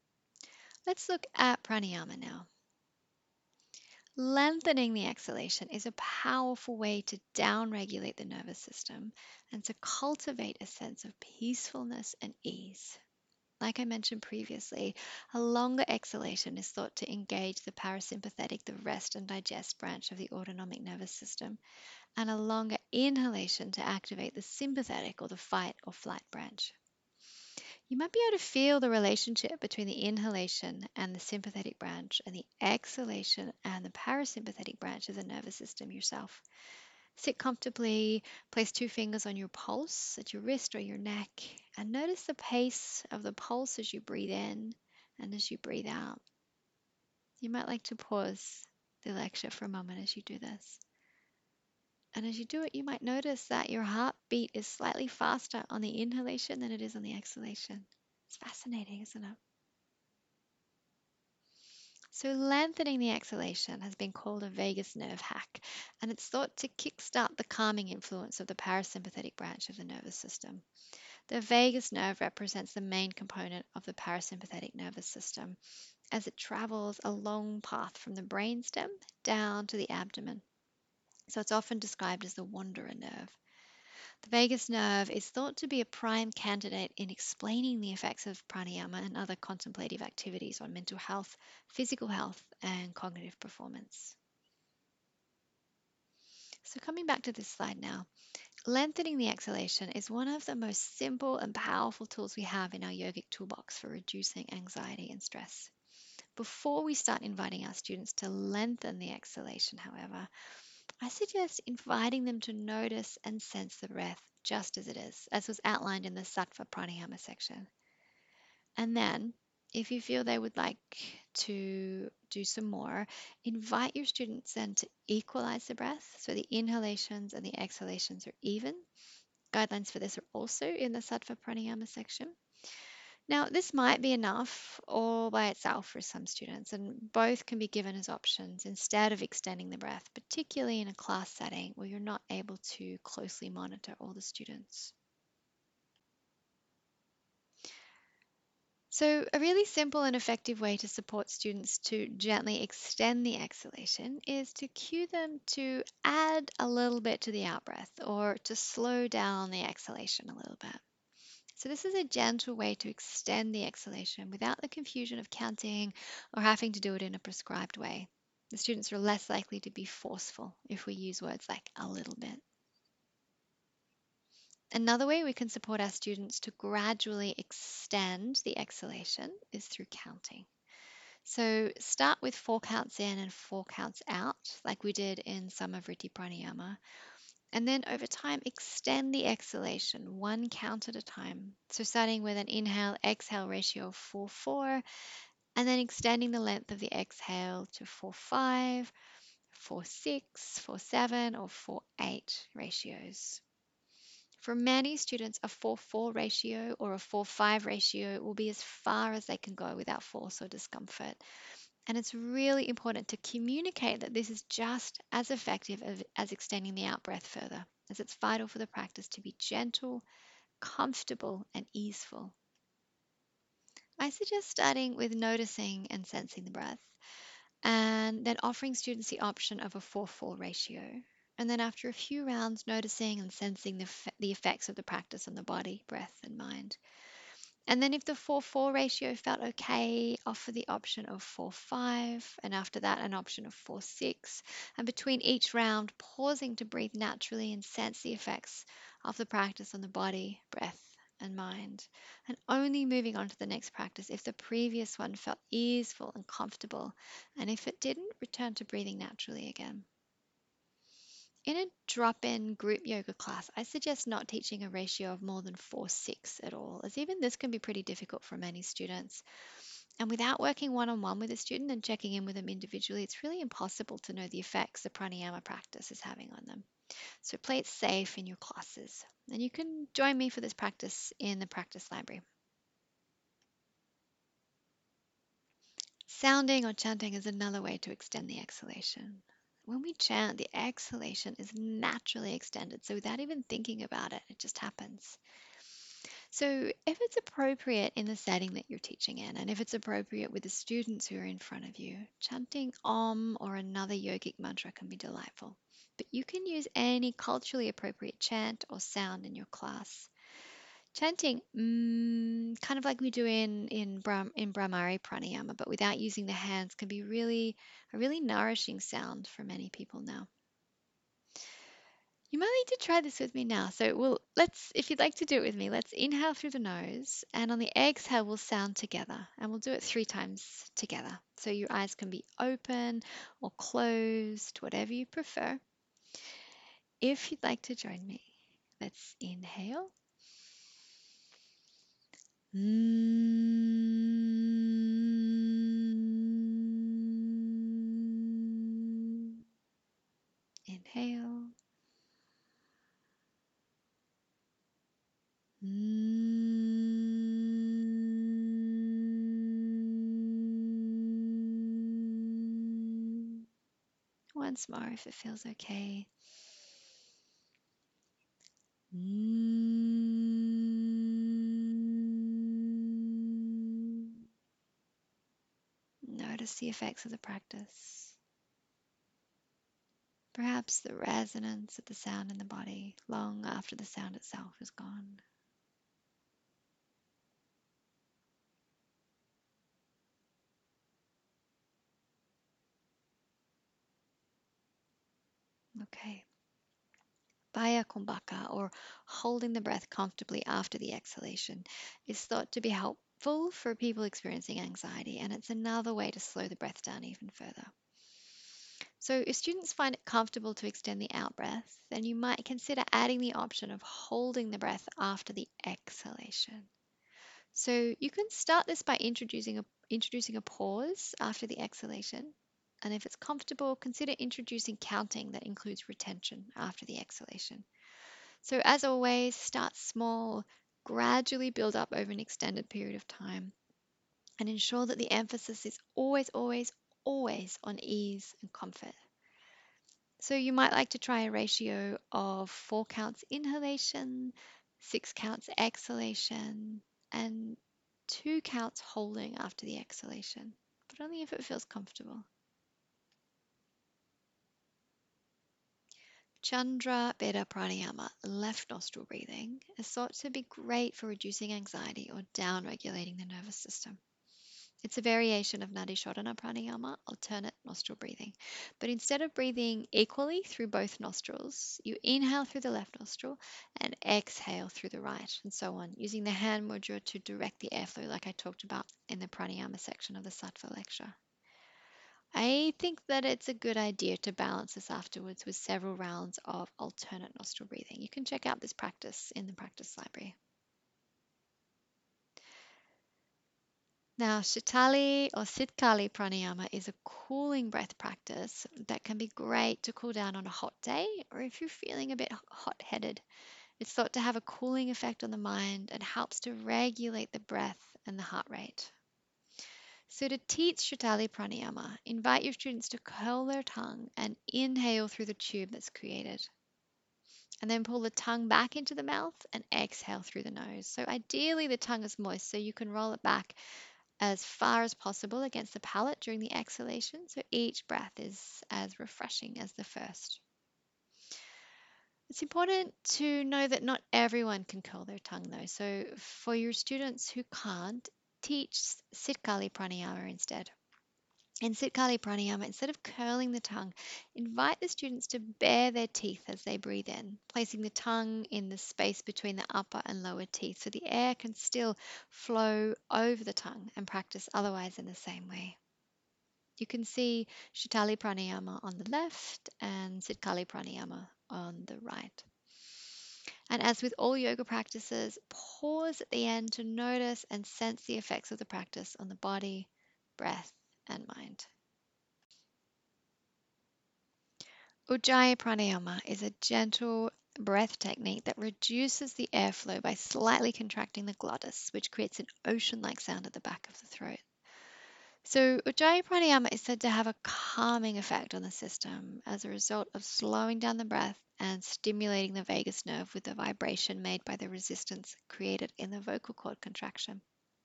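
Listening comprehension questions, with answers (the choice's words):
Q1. When teaching prāṇāyāma, what can be helpful in reducing rajas?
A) Noticing and sensing the breath.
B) Lengthening the exhalation through inviting your students to add a little to the out-breath, counting, sounding or chanting.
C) Bāhya kumbhaka, chandra bheda prāṇāyāma, sītalī prāṇāyāma, ujjāyī prāṇāyāma and mountain climbing breath.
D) All of the above.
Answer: All of the above.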